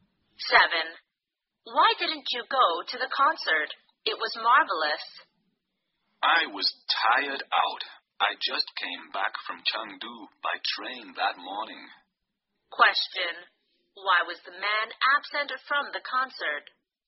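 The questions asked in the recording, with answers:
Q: Why was the man absent from the concert?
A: He was very tired from a train trip back from Chengdu.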